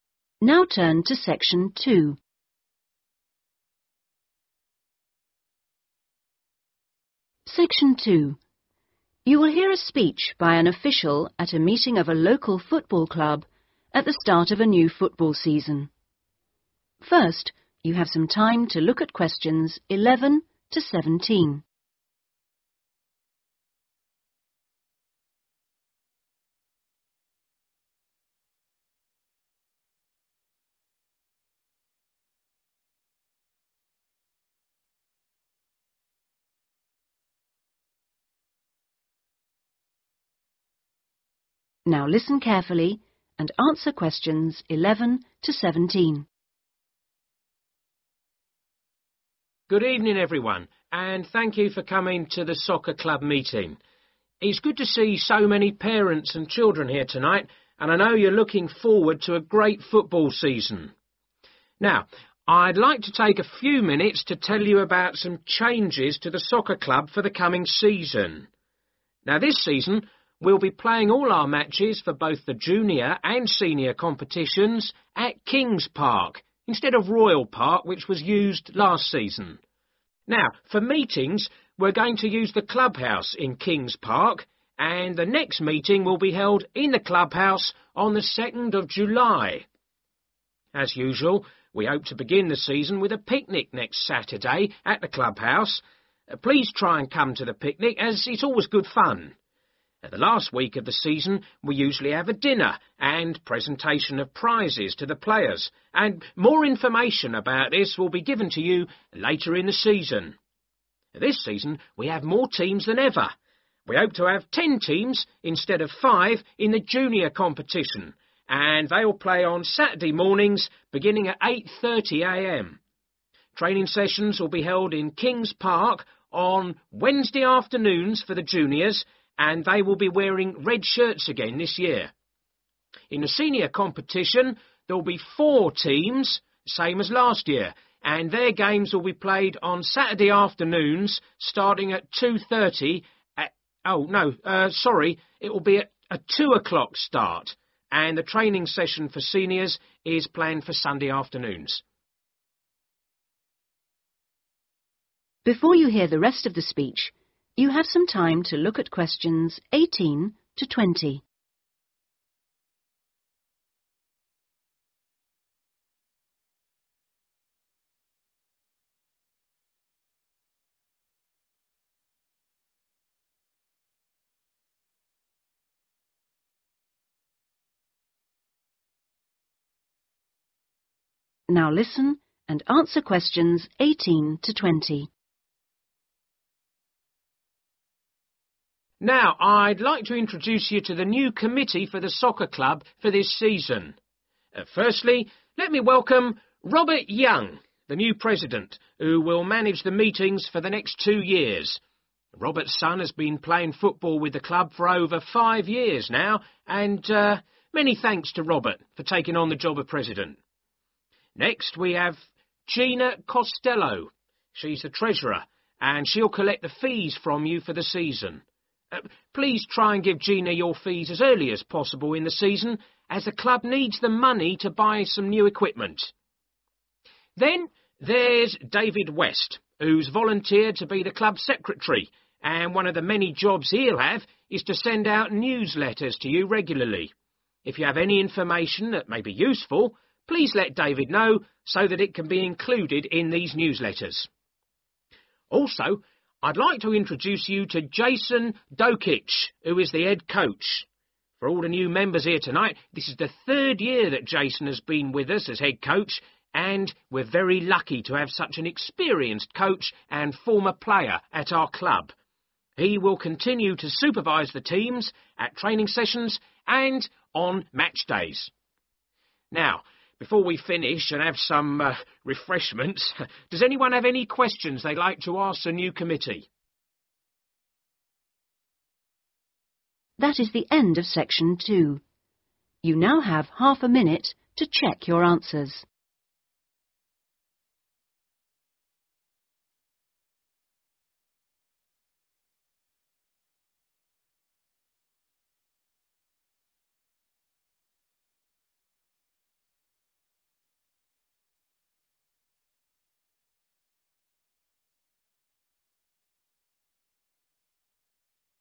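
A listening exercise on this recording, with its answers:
Complete the sentences below Write NO MORE THAN TWO WORDS for each answer.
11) The next meeting of the soccer club will be in the.............. in King's Park on 2 July.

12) The first event is a................. .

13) At the final dinner, players receive............... .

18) | Gina Costello: Treasurer | to 18.................... |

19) | David West: Secretary | to 19................... |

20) | Jason Dokic: Head Coach | to 20..................... |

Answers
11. clubhouse
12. picnic
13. prizes
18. collect the fees
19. send out newsletters
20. supervise the teams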